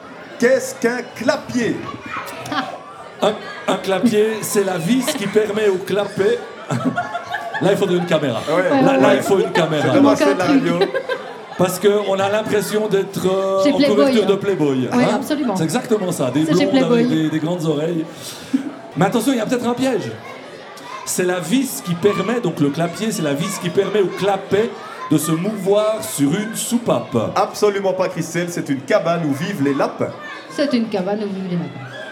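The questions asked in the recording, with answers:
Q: Qu'est-ce qu'un clapier?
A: B: une cabane où vivent les lapins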